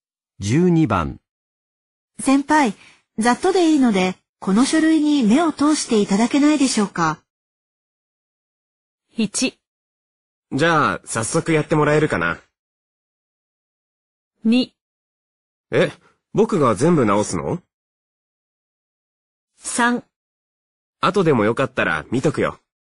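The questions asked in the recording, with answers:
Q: 先輩、ざっとでいいので、この書類に目を通していただけないでしょうか。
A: 3: 後でもよかったら見とくよ。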